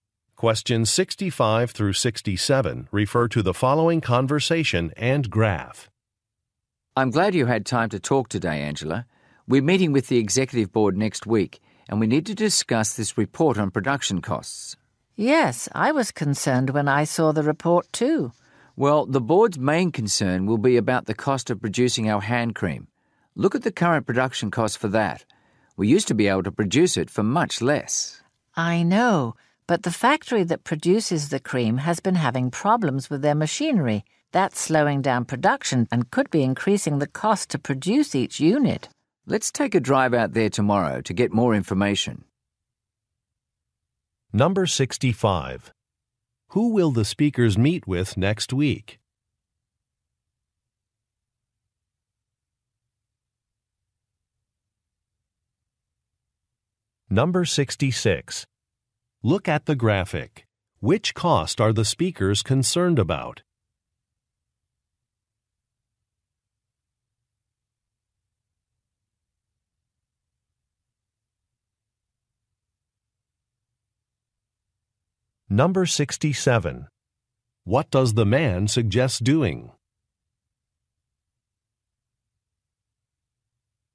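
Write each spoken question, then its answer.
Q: Who will the speakers meet with next week?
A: The executive board

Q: What does the man suggest doing?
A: Driving to the factory to get more information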